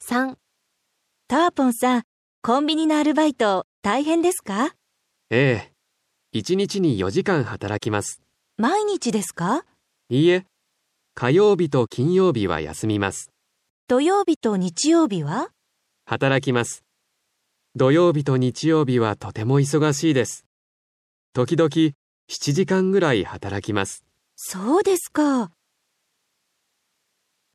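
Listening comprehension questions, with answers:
3.1日・1週間・1年に 何回 しますか。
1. タワポンは 1週間に { 4 5 7} 回 アルバイトを します。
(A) 4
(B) 5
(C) 7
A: (B) 5

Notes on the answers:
B: ええ、 1日に 4時間 働きます。 A: 毎日ですか。 B: いいえ、 火曜日と金曜日は 休みます。 A: 土曜日と 日曜日は? B: 働きます。

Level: N5

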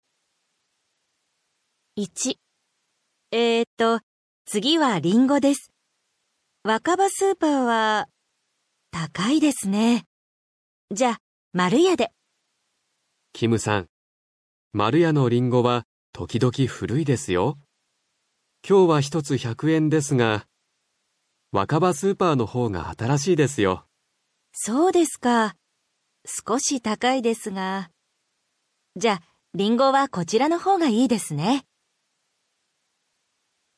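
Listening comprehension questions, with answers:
どちらの スーパーで 買いますか。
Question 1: りんご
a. わかば スーパー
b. まるや スーパー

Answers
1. a. わかば スーパー

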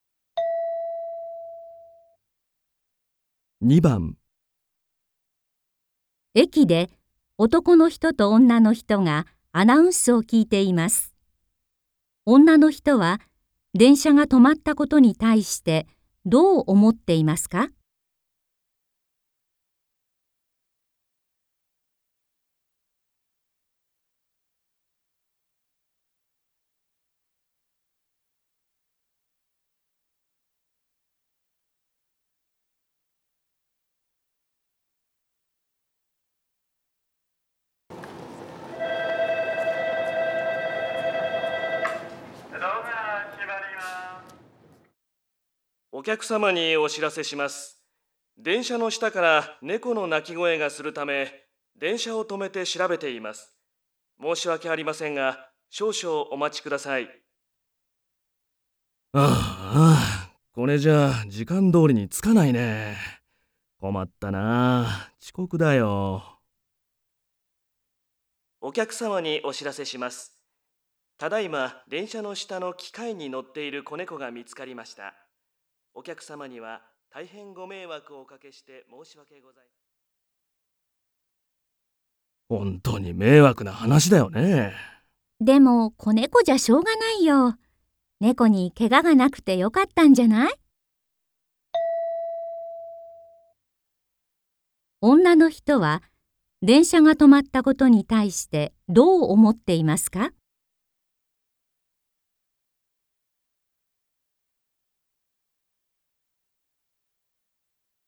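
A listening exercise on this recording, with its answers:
この問題では、まず質問を聞いてください。そのあと、問題用紙を見てください。読む時間があります。それから話を聞いて、問題用紙の1から4の中から、最もよいものを一つえらんでください。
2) 女の人は、電車が止まったことに対してどう思っていますか。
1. 遅刻ちこくするので困ると思っている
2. 本当に迷惑めいわくだと思っている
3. しかたないと思っている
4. とてもよかったと思っている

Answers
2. 3. しかたないと思っている

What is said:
2.駅で、男の人と女の人がアナウンスを聞いています。女の人は、電車が止まったことに対してどう思っていますか。
M1: お客様にお知らせします。電車の下から猫の鳴き声がするため、電車を止めて調べています。申し訳ありませんが、少々お待ちください。
M2: あーあ、これじゃあ、時間どおりに着かないね。困ったなあ。遅刻だよ。
M1: お客様にお知らせします。ただいま電車の下の機械に乗っている子猫が見つかりました。
M2: 本当に迷惑な話だよね。
F: でも、子猫じゃしょうがないよ。猫にけががなくてよかったんじゃない?

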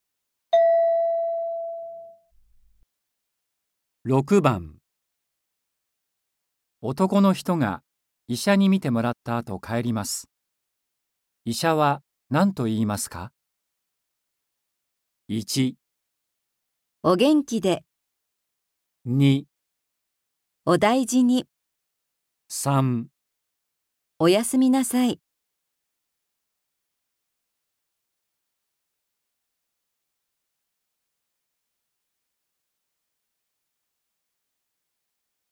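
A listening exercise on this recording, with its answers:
男の人が、医者に見てもらった後、帰ります。医者は何と言いますか。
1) お元気で。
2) お大事に。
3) お休みなさい。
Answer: 2) お大事に。

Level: N4

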